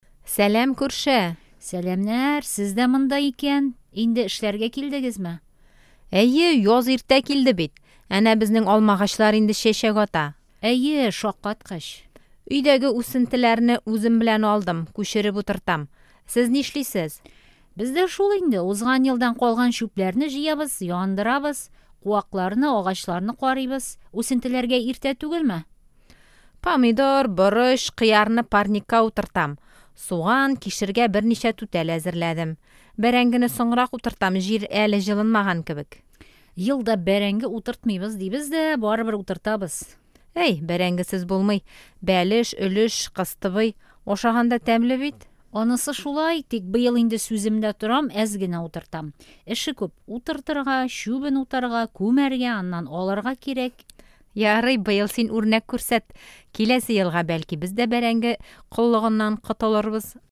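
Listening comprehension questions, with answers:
Бирем. Ответьте на вопросы:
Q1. Нурия бакчага нәрсәләр эшләргә килгән?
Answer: Узган елдан калган чүпләрне җыярга, яндырырга, куакларны, агачларны карарга.

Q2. Гөлнур үсентеләрен кая утырта?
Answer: Парникка.

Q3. Нурия быел бәрәңге утыртамы?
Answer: Әйе, әз генә утырта.

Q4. Гөлнур бәрәңгедән нәрсәләр пешерә?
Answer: Бәлеш, өлеш, кыстыбый.

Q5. Бәрәңге үстерер өчен нишләргә кирәк?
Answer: Утыртырга, чүбен утарга, күмәргә, аннан алырга.

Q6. Гөлнур киләсе елга нәрсә эшләргә тели?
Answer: Бәрәңге коллыгыннан котылырга (бәрәңге утыртмаска).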